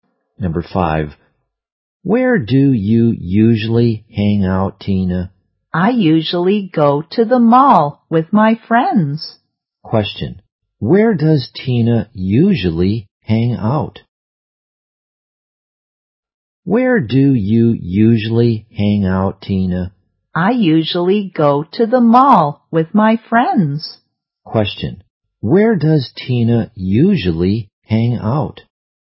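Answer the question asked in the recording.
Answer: At the mall.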